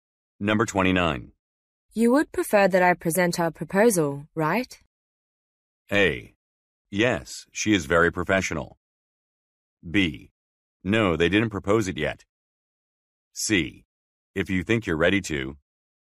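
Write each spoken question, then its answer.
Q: You would prefer that I present our proposal, right?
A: C: If you think you're ready to.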